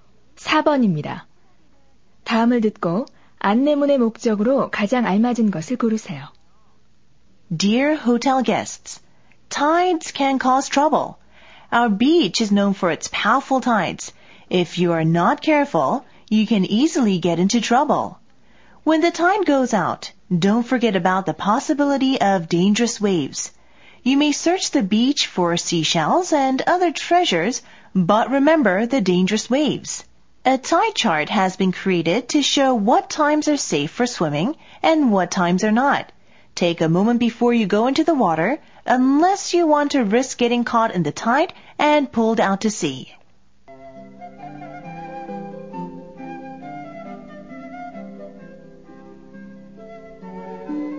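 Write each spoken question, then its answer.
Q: 다음을 듣고 안내문의 목적으로 가장 알맞은 것을 고르세요.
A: 호텔 투숙객에게 위험한 조류에 대해 경고하기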